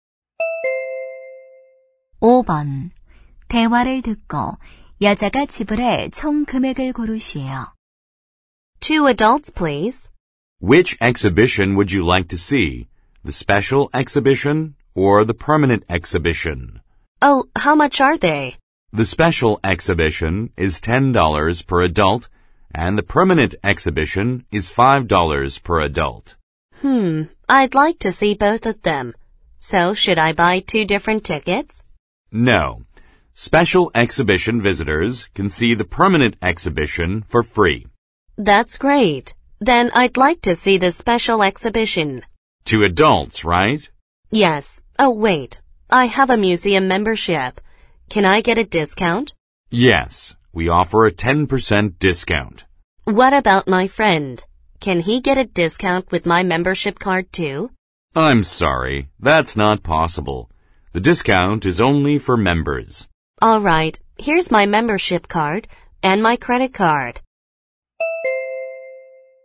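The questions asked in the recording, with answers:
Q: 대화를 듣고 여자가 지불해 총 금액을 고르시오.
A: 19달러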